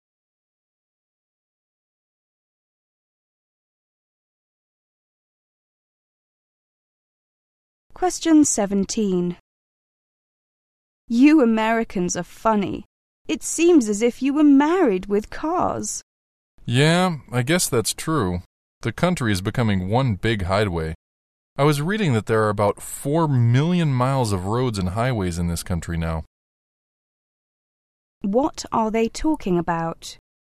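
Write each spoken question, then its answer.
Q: What are they talking about?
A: Americans' love of cars and the many roads and highways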